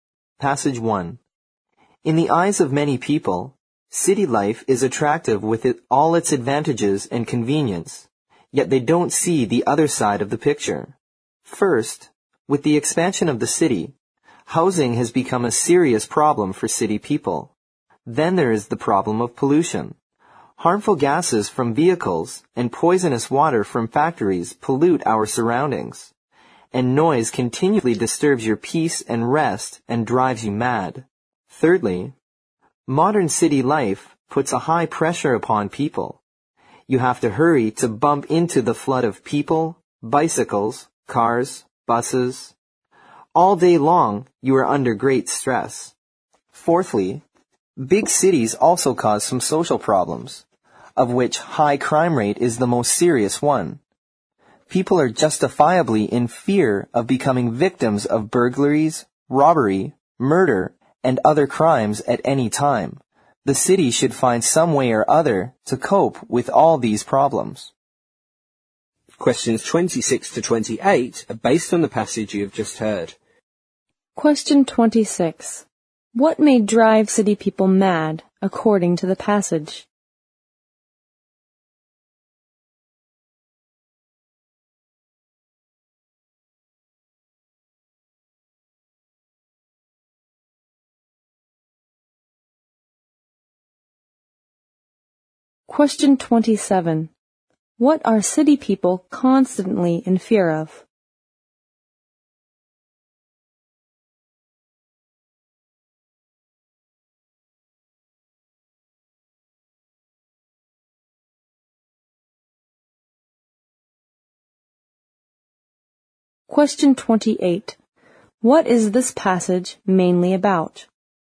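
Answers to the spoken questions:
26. Noise
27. Becoming victims of crime
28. The problems of city life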